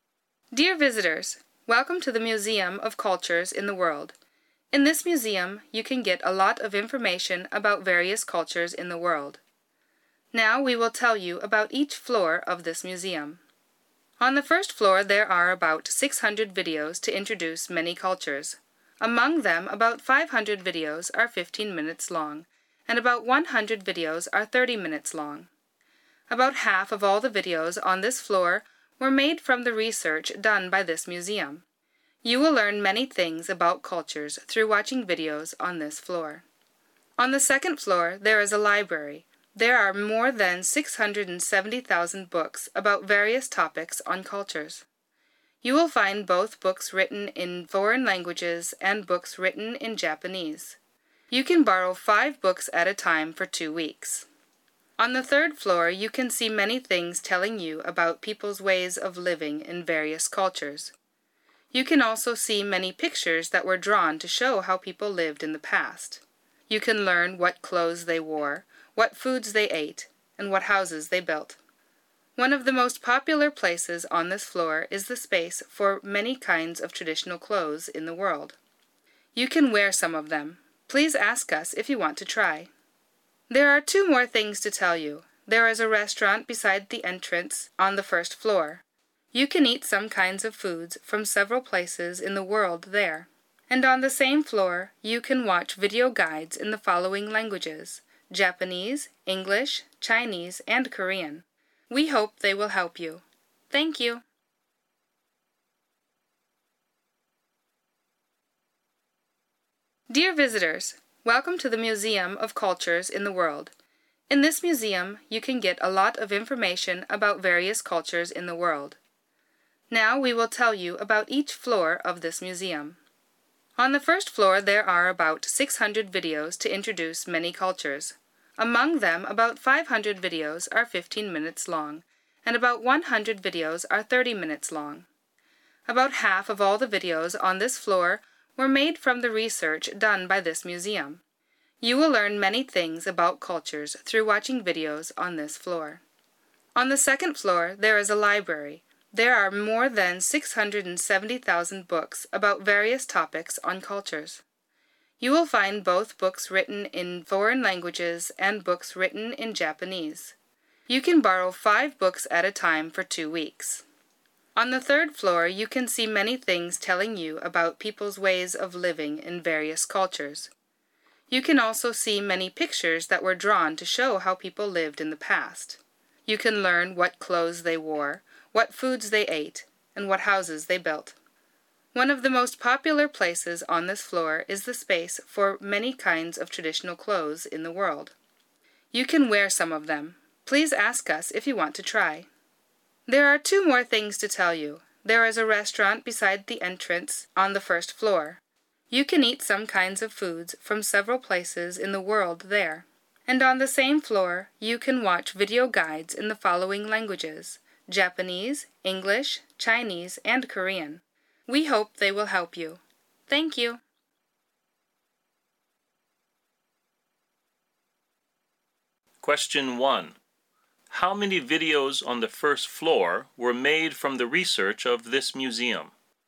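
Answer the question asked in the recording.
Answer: About 300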